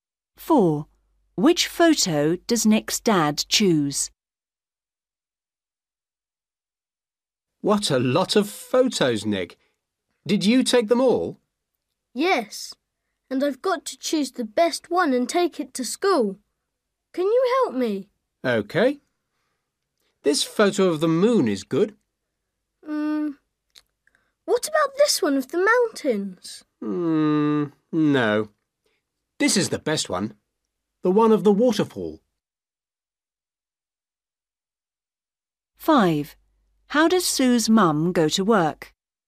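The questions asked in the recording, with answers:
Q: Which photo does Nick's dad choose?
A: The one of the waterfall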